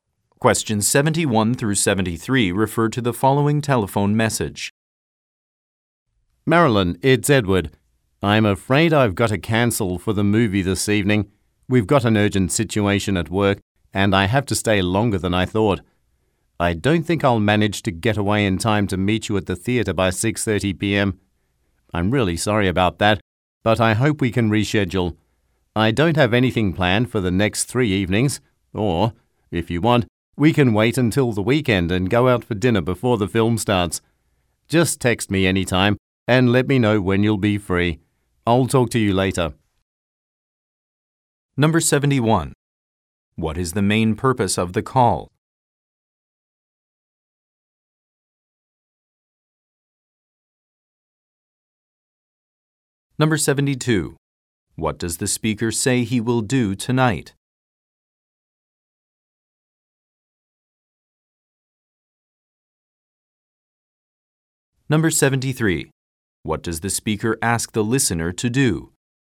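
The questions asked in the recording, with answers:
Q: What is the main purpose of the call?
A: To cancel plans to see a movie this evening

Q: What does the speaker say he will do tonight?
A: Stay late at work to handle an urgent situation

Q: What does the speaker ask the listener to do?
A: Text him to say when she is free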